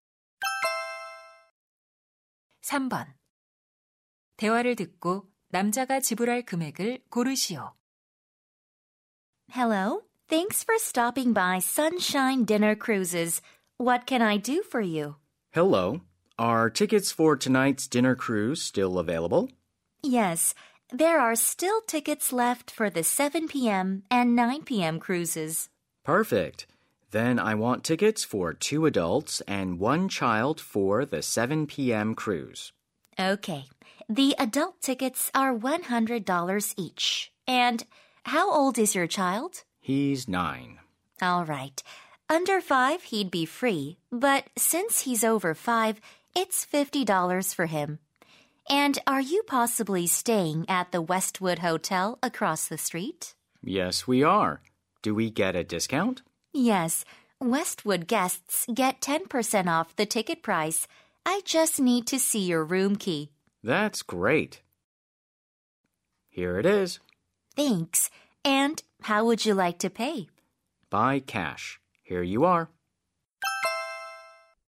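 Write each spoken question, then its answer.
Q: 대화를 듣고 남자가 지불할 금액을 고르시오.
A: $225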